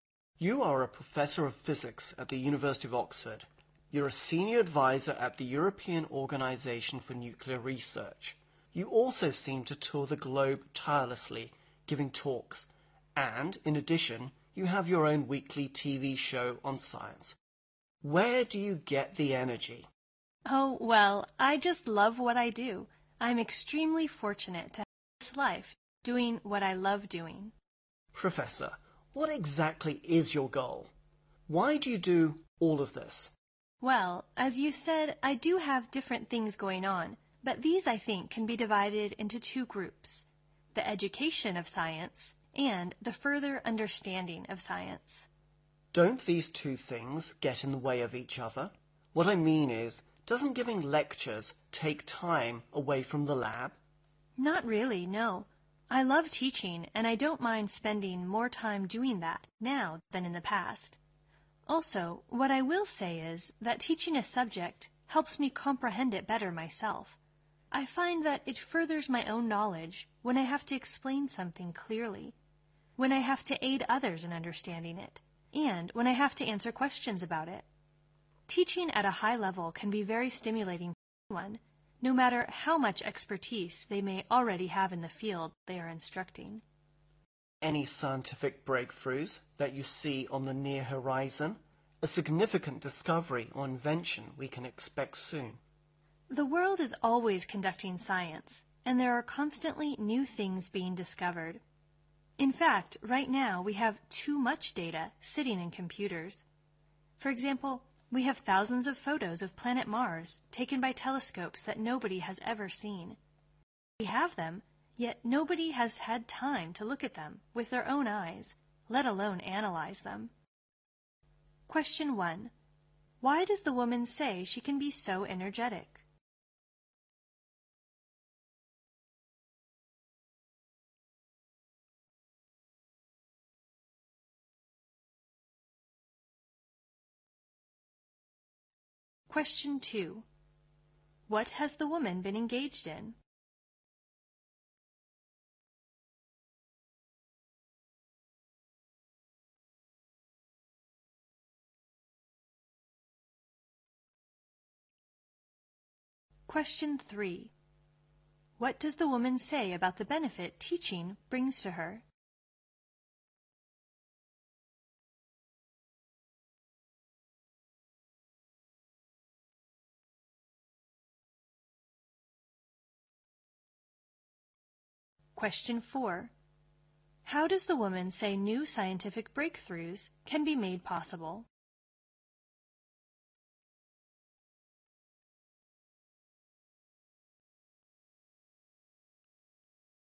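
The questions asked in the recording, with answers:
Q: Why does the woman say she can be so energetic?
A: She loves what she does.

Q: What has the woman been engaged in?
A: Science education and further understanding of science (teaching, research, talks, a TV show)

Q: What does the woman say about the benefit teaching brings to her?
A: It helps her understand the subject better herself.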